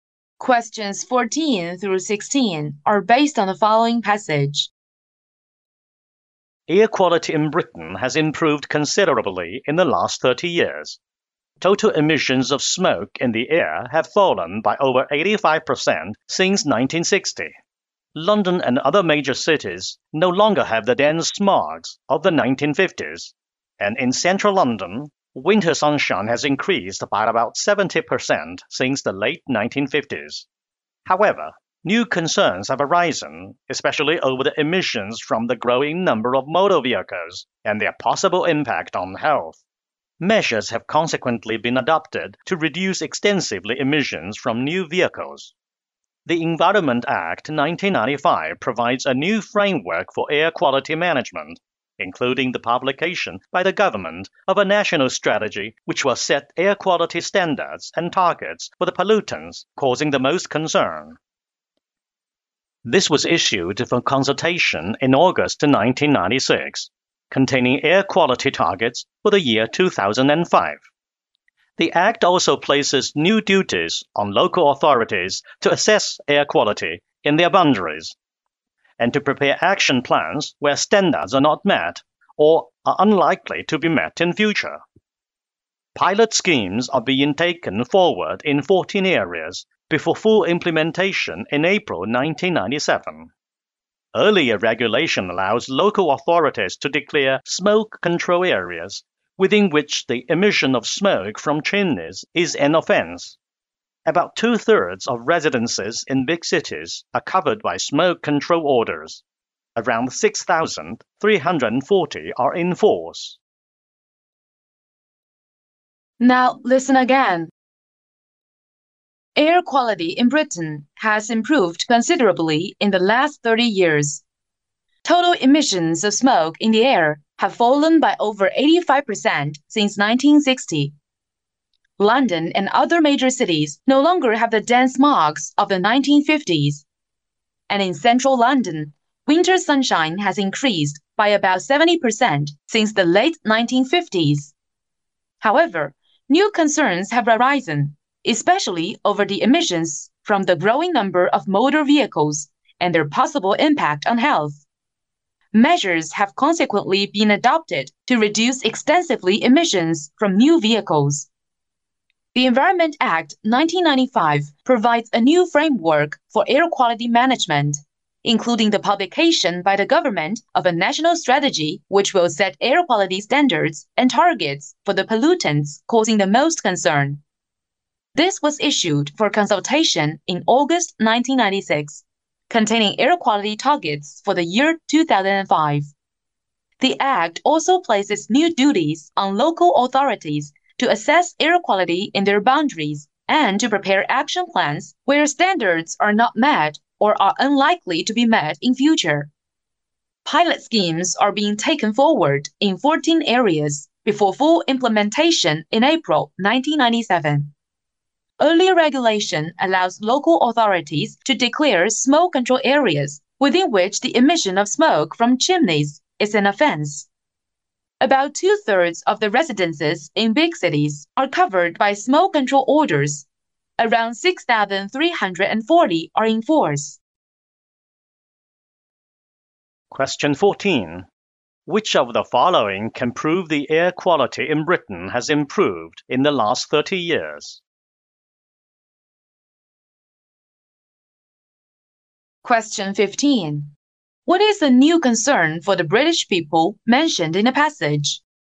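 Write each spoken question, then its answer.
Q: What is the new concern for the British people mentioned in the passage?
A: Emissions from the growing number of motor vehicles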